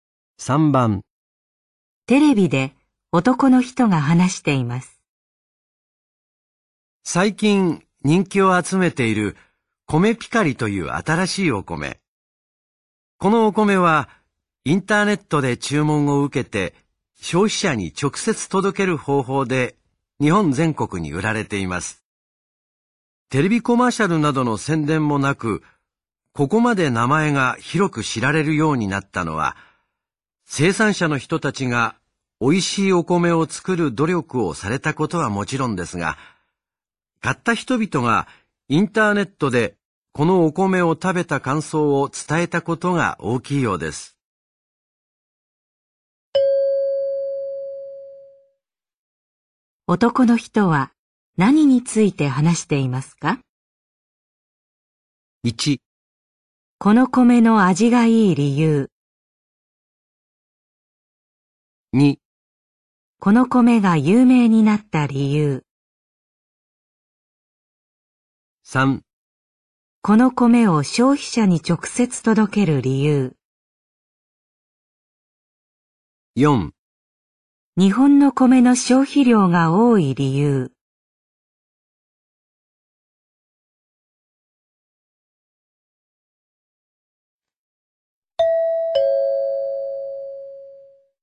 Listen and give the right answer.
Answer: 2

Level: N3 Listening · Test 9